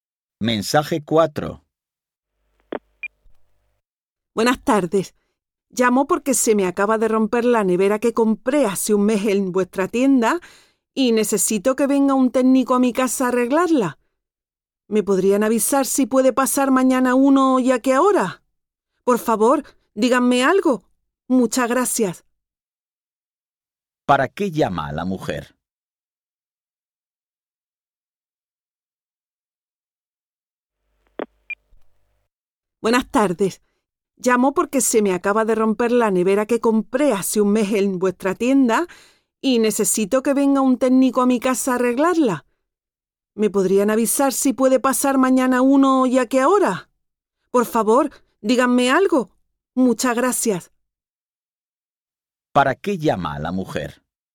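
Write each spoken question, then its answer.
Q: ¿Para qué llama a la mujer?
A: Para pedir que un técnico arregle su nevera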